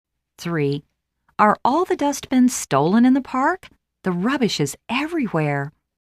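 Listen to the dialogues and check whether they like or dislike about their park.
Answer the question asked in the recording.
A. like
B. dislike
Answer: B. dislike

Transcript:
3.Are all the dustbins stolen in the park? The rubbish is everywhere!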